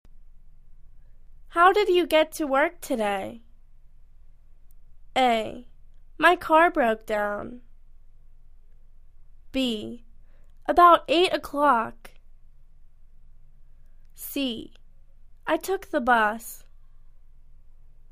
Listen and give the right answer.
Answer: I took the bus.